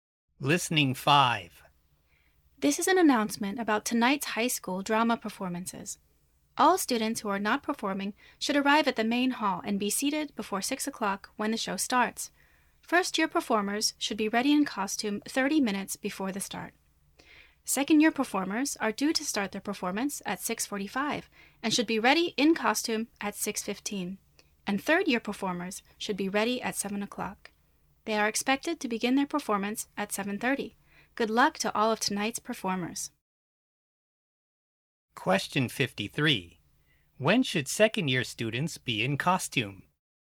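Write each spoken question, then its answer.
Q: When should second-year students be in costume?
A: At 6:15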